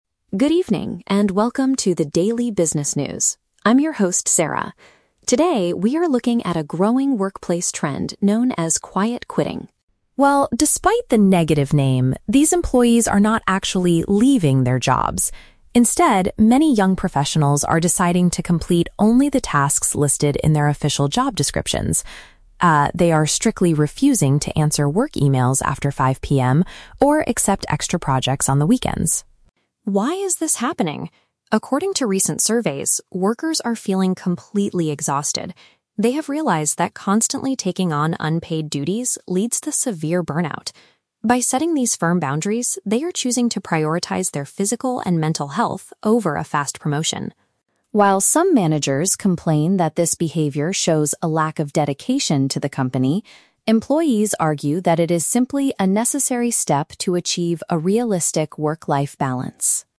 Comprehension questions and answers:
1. What does the term "Quiet Quitting" actually mean in this report?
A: Employees complete only their required duties without doing extra work.

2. What is the main reason young professionals are following this trend?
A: They are extremely tired and want to protect their overall well-being.

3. How do some managers view this new behavior from their staff?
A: They believe that it demonstrates a poor level of commitment.

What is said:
Reporter: Good evening, and welcome to the daily business news. I'm your host, Sarah. Today, we are looking at a growing workplace trend known as "Quiet Quitting."
Well, despite the negative name, these employees are not actually leaving their jobs. Instead, many young professionals are deciding to complete only the tasks listed in their official job descriptions. Ah, they are strictly refusing to answer work emails after 5 PM or accept extra projects on the weekends.
Why is this happening? According to recent surveys, workers are feeling completely exhausted. They have realized that constantly taking on unpaid duties leads to severe burnout. By setting these firm boundaries, they are choosing to prioritize their physical and mental health over a fast promotion.
While some managers complain that this behavior shows a lack of dedication to the company, employees argue that it is simply a necessary step to achieve a realistic work-life balance.